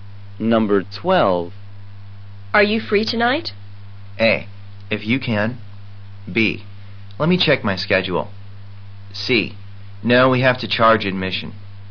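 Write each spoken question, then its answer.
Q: Are you free tonight?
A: B: Let me check my schedule.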